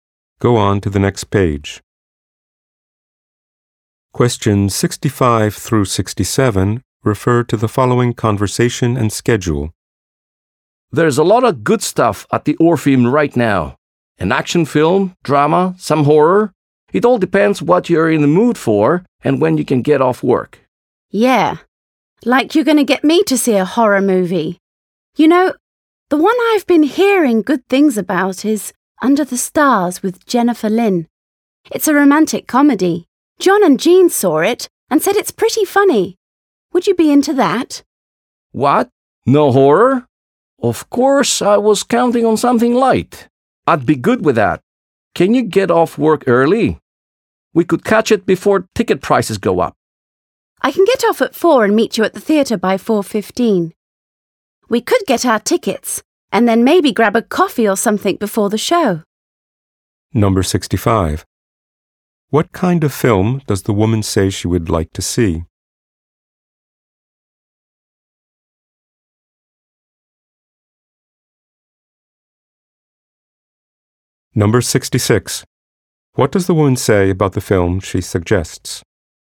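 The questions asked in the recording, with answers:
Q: What kind of film does the woman say she would like to see?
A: A romantic comedy

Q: What does the woman say about the film she suggests?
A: Friends said it's pretty funny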